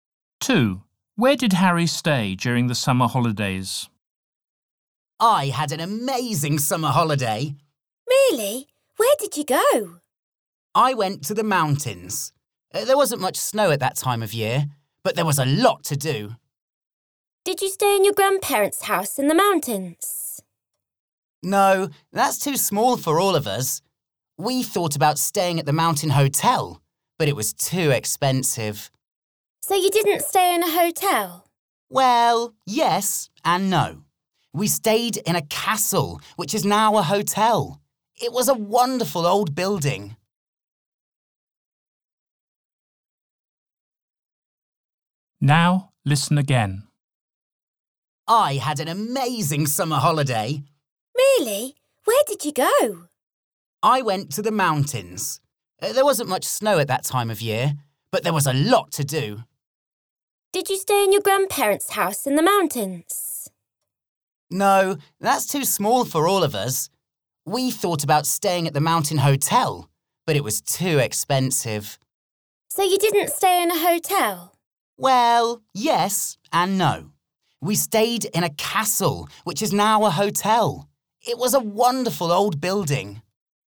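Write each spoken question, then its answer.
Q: Where did Harry stay during the summer holidays?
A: in a castle (now a hotel)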